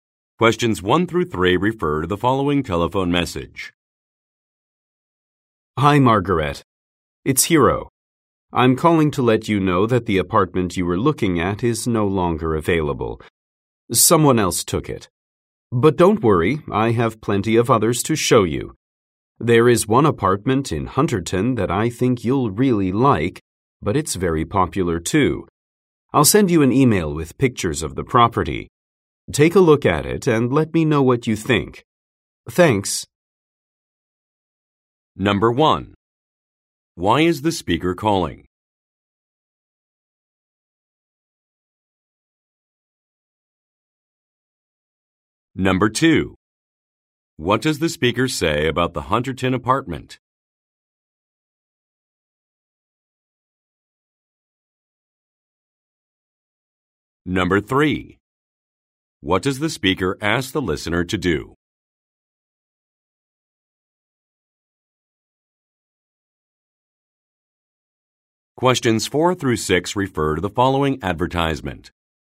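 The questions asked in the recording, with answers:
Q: Why is the speaker calling?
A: The apartment is no longer available

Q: What does the speaker say about the Hunterton apartment?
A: It is very popular

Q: What does the speaker ask the listener to do?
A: Look at the emailed pictures and give her opinion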